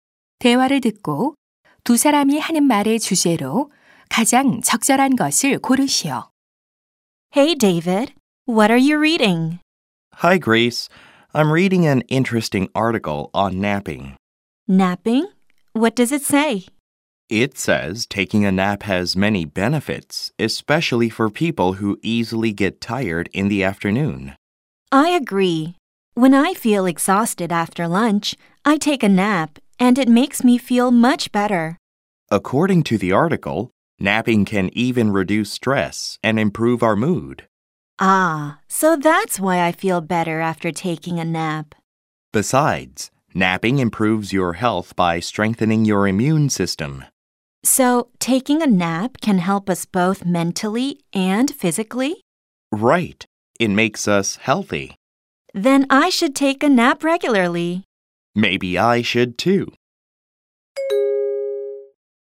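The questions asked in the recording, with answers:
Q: 대화를 듣고 두 사람이 하는 말의 주제로 가장 적절한 것을 고르시오.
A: 낮잠의 여러 가지 이점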